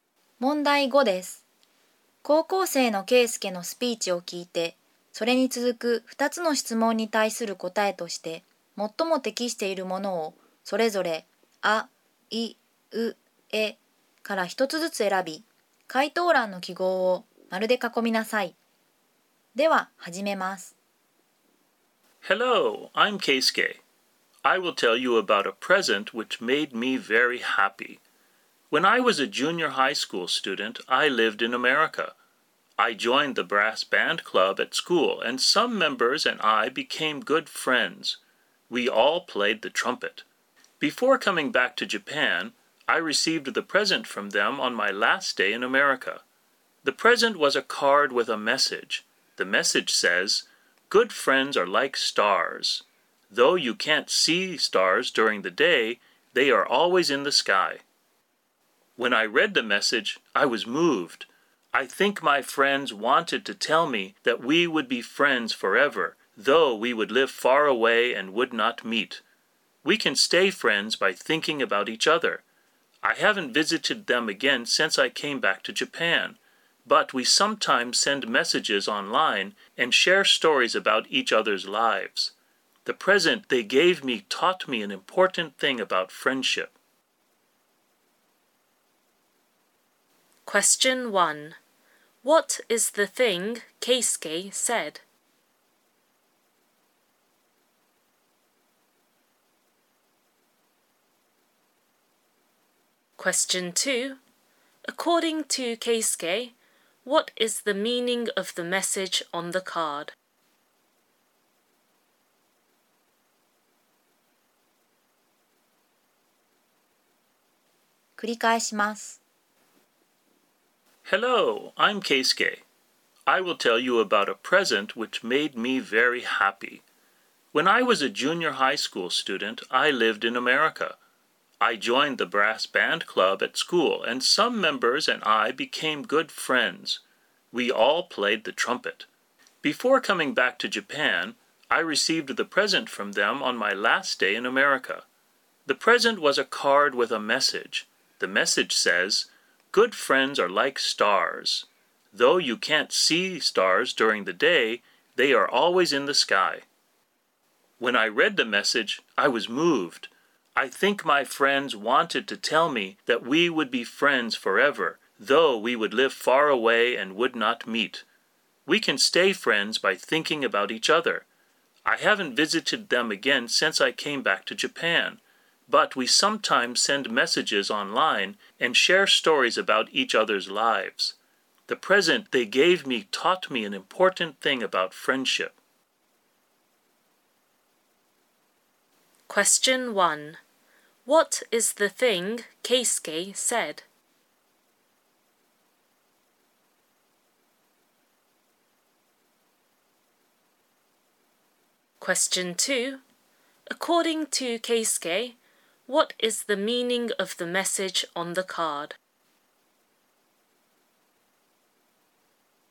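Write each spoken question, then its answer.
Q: According to Keisuke,What is the meaning of the message on the card?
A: They will be friends forever, even though they live far away and do not meet.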